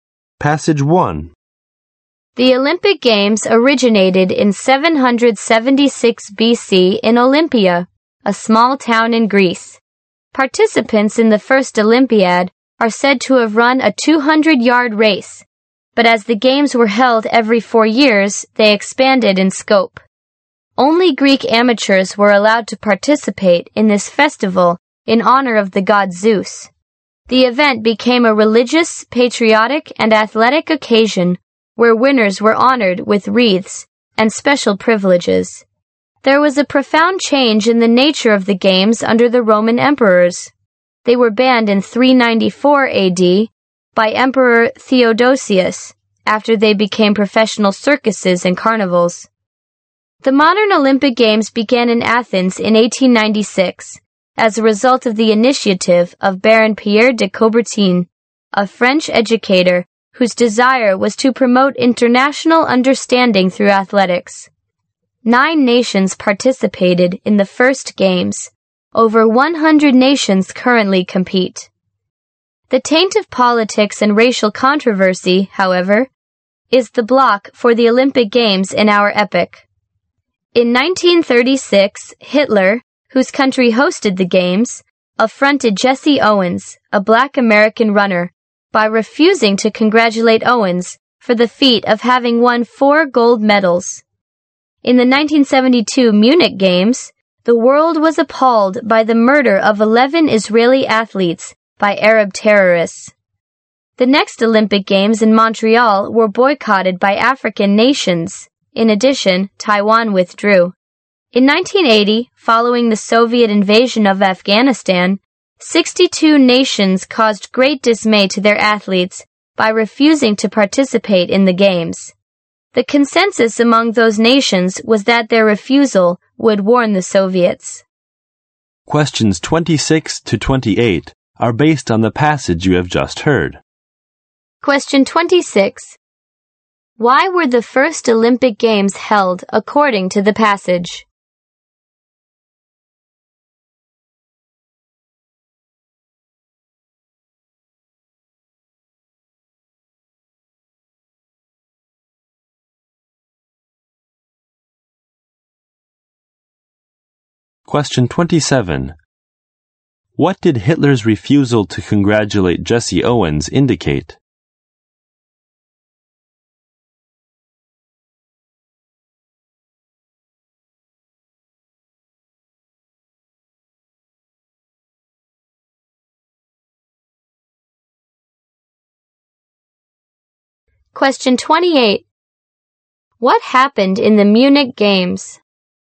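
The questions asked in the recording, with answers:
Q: Why were the first Olympic Games held according to the passage?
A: To honor the god Zeus.

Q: What did Hitler's refusal to congratulate Jesse Owens indicate?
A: Racial discrimination.

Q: What happened in the Munich Games?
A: Arab terrorists murdered 11 Israeli athletes.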